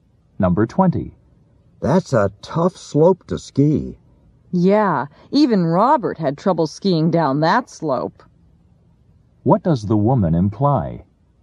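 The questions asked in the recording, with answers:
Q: What does the woman imply?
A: Robert is a good skier, so the slope is very difficult.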